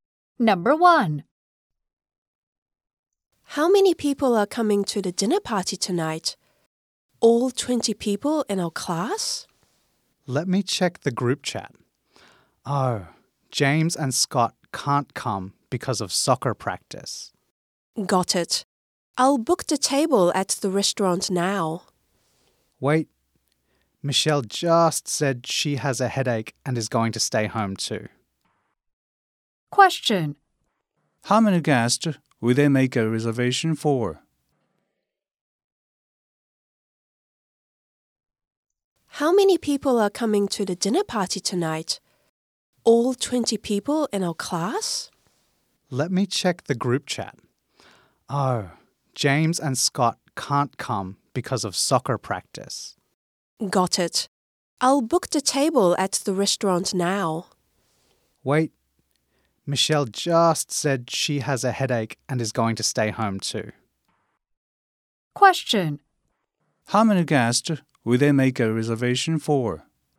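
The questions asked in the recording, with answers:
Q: How many guests will they make a reservation for?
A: 17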